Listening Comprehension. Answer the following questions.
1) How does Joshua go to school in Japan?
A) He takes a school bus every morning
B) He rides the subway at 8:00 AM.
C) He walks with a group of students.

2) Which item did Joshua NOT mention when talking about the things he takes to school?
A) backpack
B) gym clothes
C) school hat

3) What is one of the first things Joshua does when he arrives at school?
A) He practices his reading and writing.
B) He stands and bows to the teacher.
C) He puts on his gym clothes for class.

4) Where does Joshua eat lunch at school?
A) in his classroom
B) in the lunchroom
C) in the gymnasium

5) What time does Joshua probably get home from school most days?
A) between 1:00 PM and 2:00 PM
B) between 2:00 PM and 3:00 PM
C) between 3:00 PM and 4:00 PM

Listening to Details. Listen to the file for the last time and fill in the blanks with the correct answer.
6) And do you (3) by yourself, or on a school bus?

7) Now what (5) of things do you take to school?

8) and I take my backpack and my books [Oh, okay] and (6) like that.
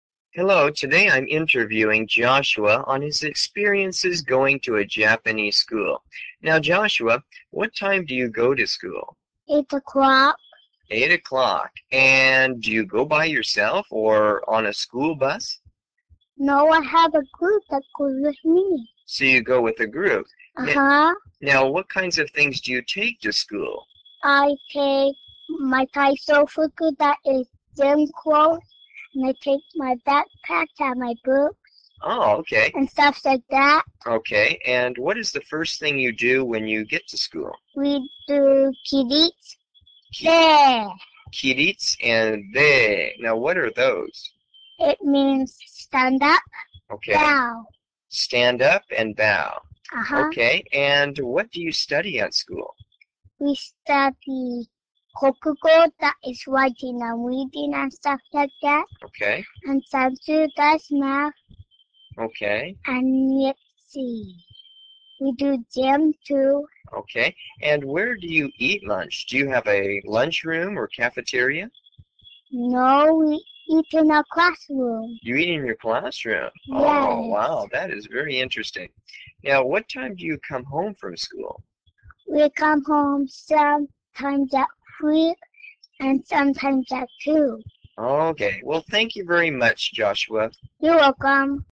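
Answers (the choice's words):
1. He walks with a group of students.
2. school hat
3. He stands and bows to the teacher.
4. in his classroom
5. between 2:00 PM and 3:00 PM
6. go
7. kinds
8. stuff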